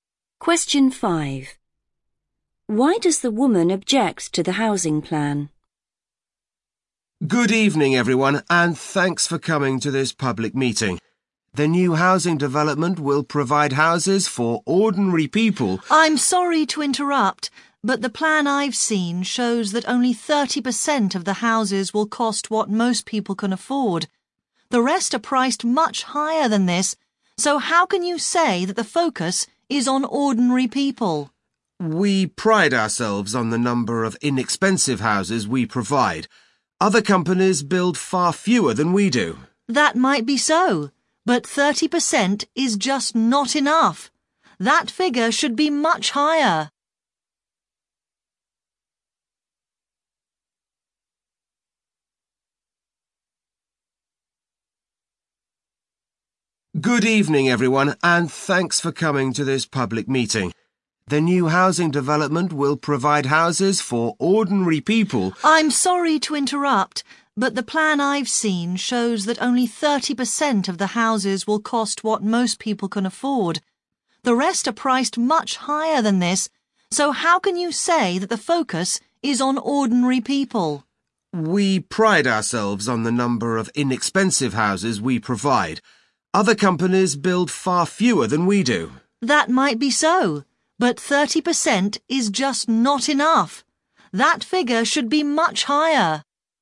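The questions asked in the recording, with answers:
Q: Why does the woman object to the housing plan?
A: only 30% of the houses will be affordable for ordinary people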